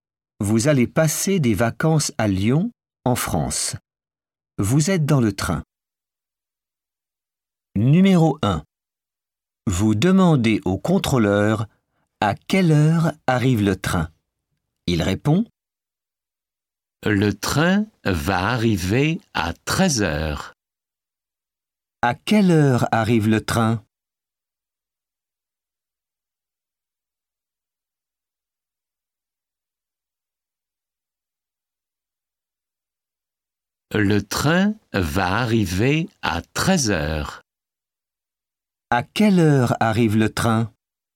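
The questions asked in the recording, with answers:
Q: À quelle heure arrive le train ?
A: À 13 heures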